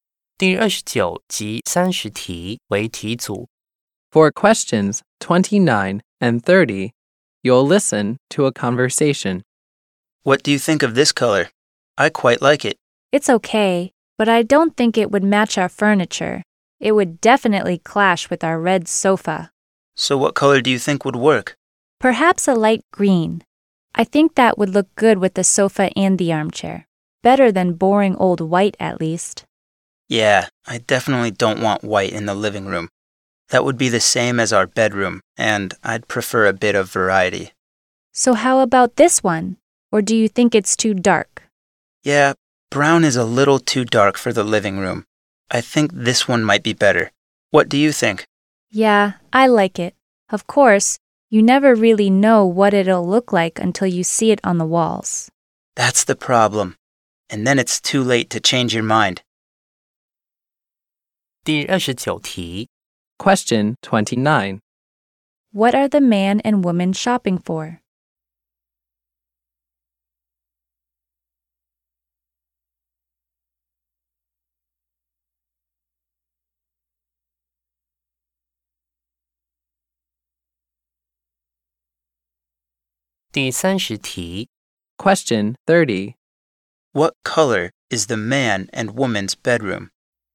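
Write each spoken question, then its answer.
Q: What are the man and woman shopping for?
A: Paint for the living room walls

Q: What color is the man and woman's bedroom?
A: White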